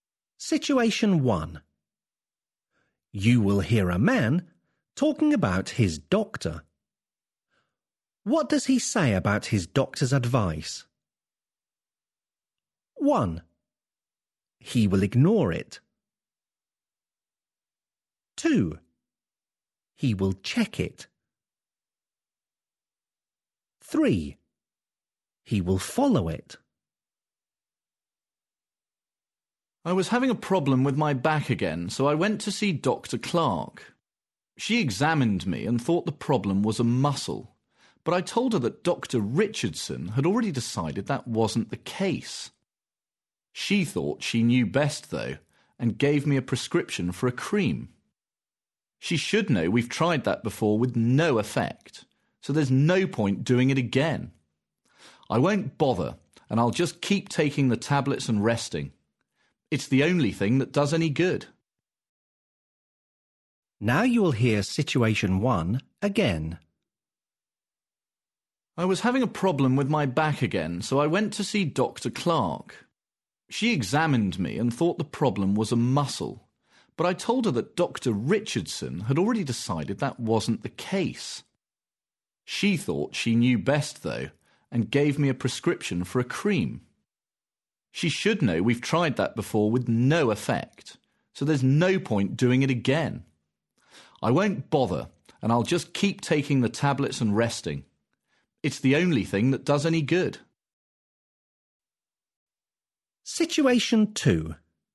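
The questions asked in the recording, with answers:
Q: What does he say about his doctor's advice?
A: 1: He will ignore it.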